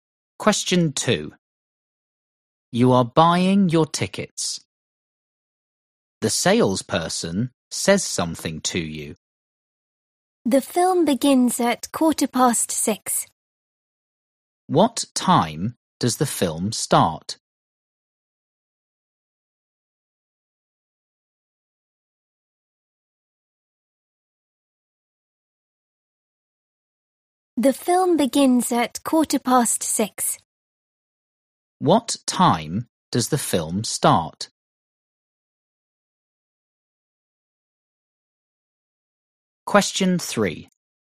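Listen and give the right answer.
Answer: 6:15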